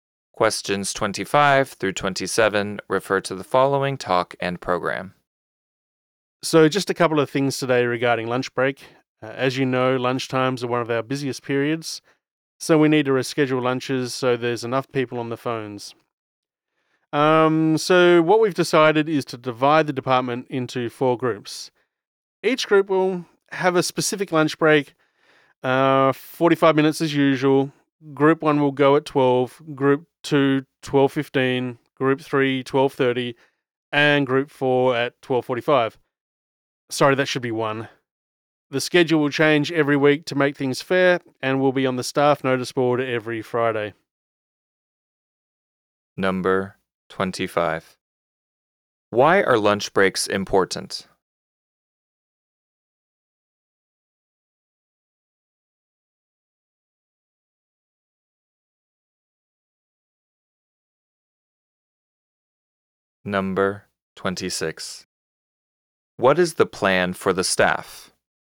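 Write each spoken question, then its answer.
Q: What is the plan for the staff?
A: Divide the department into four groups, each with its own lunch break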